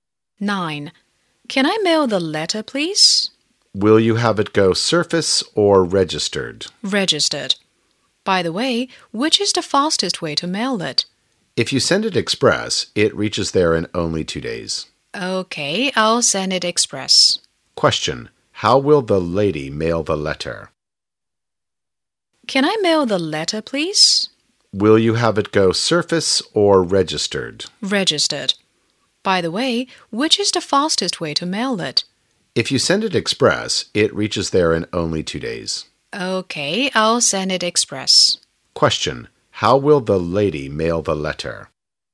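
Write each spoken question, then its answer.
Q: How will the lady mail the letter?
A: By express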